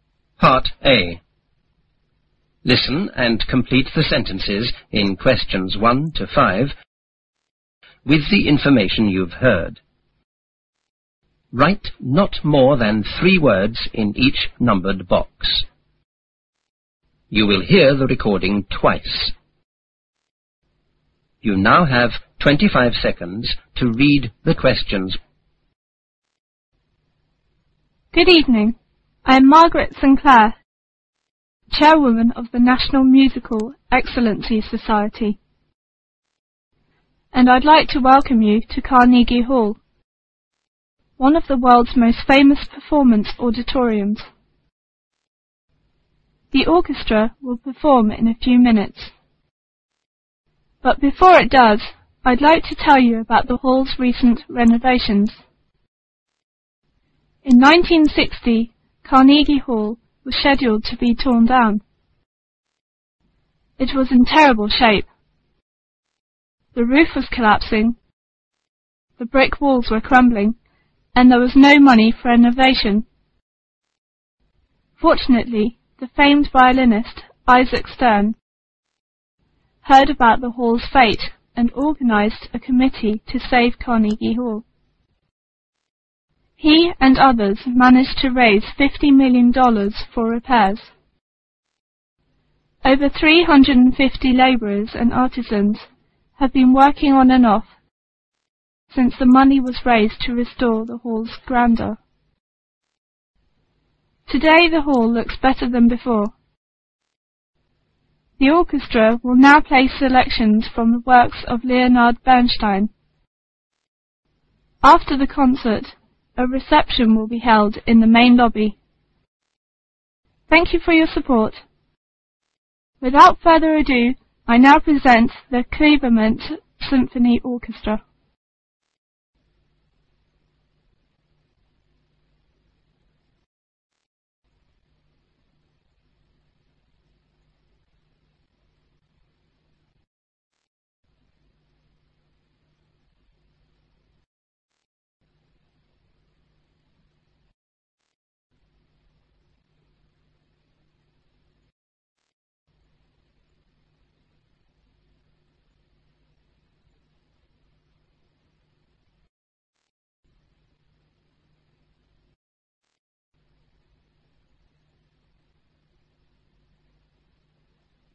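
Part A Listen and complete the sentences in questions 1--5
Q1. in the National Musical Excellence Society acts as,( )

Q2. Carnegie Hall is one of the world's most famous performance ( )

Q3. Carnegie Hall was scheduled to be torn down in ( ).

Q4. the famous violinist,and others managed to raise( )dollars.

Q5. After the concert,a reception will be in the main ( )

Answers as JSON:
{"1": "chairwoman", "2": "auditoriums", "3": "1960", "4": "fifty million", "5": "lobby"}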